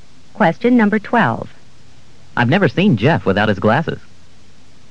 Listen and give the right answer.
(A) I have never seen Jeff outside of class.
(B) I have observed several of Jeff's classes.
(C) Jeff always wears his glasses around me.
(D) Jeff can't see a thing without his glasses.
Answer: (C) Jeff always wears his glasses around me.

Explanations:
I've never seen Jeff without his glasses.